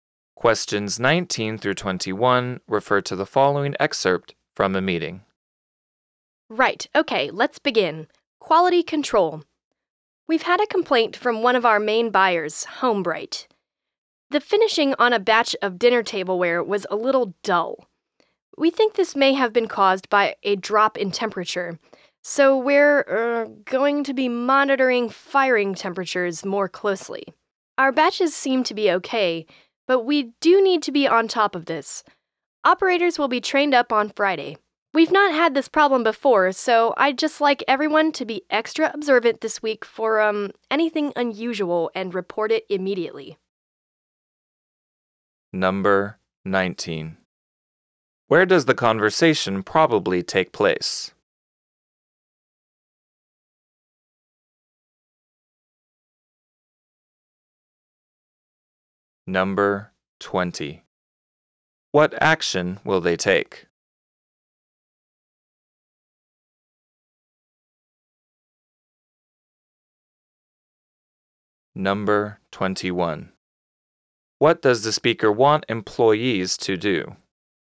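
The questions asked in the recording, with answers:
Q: What action will they take?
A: Monitor firing temperatures more closely

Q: What does the speaker want employees to do?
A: Be extra observant and report anything unusual immediately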